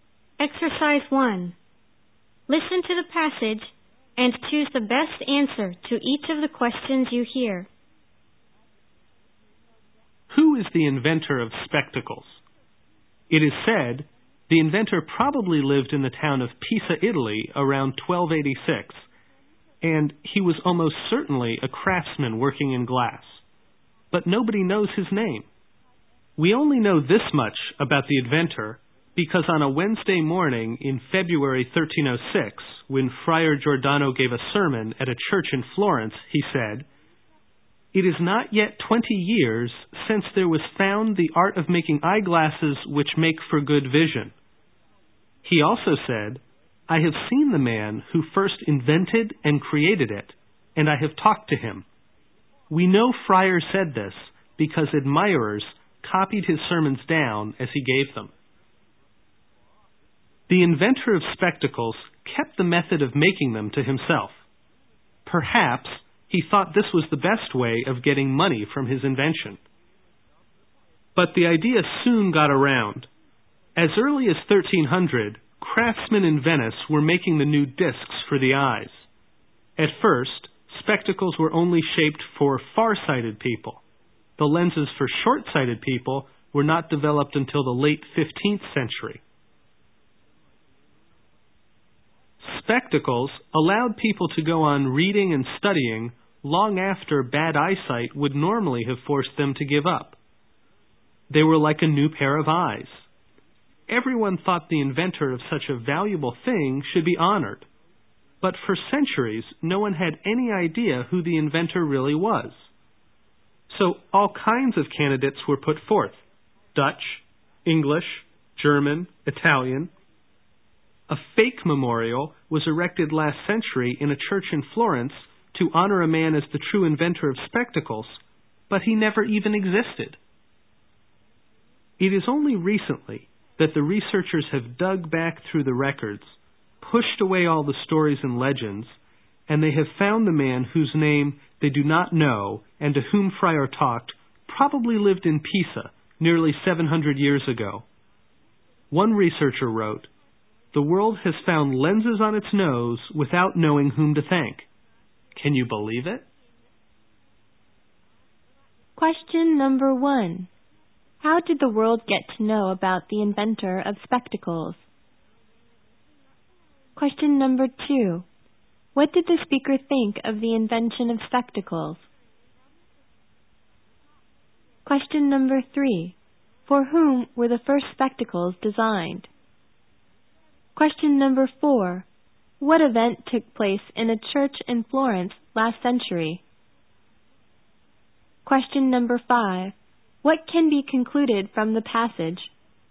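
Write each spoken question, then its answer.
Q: How did the world get to know about the inventor of spectacles?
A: Through Friar Giordano's 1306 sermon, which admirers copied down

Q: What did the speaker think of the invention of spectacles?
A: It was very valuable, like a new pair of eyes

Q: For whom were the first spectacles designed?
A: Far-sighted people

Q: What event took place in a church in Florence last century?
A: A fake memorial was put up to honor a man who never existed as the inventor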